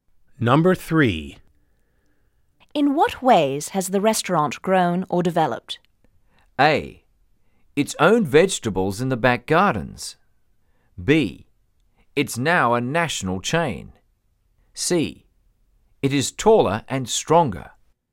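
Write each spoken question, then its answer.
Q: In what ways has the restaurant grown or developed?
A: B: It's now a national chain.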